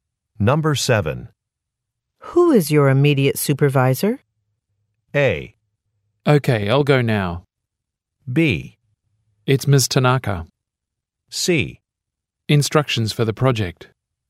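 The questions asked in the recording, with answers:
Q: Who is your immediate supervisor?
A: B: It's Ms. Tanaka.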